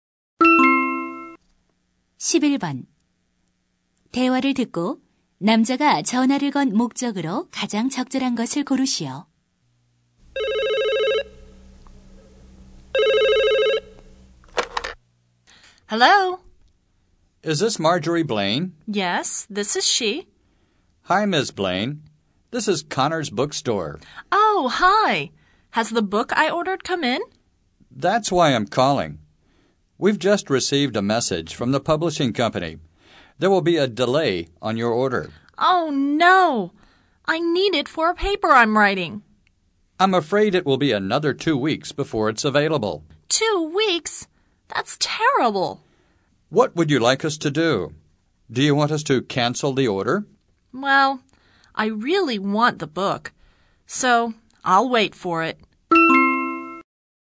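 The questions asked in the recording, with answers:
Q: 대화를 듣고 남자가 전화를 건 목적으로 가장 적절한 것을 고르시오.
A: 주문한 책의 배송이 늦어진다는 것을 알리려고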